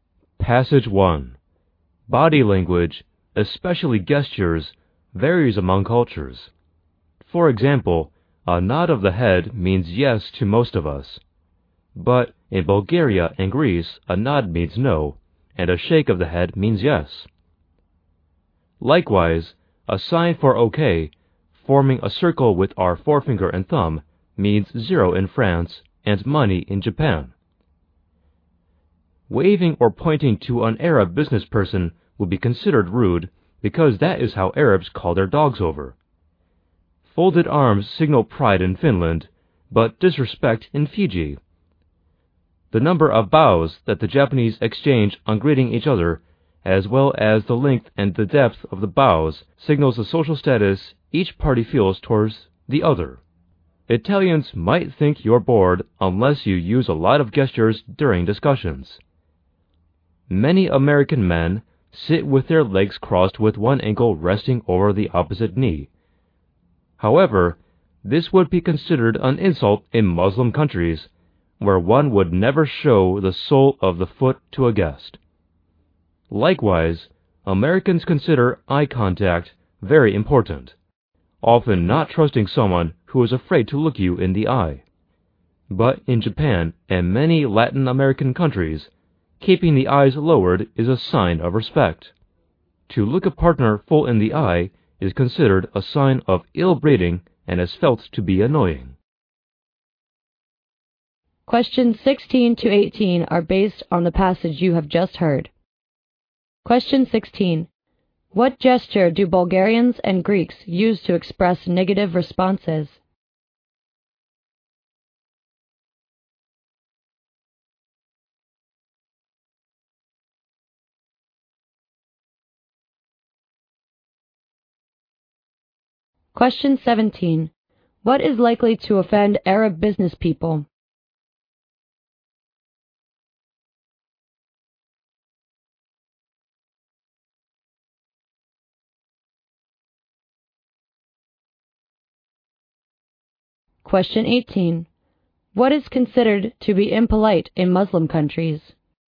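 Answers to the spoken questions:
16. A nod of the head.
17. Waving or pointing to them.
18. Showing the sole of the foot to a guest.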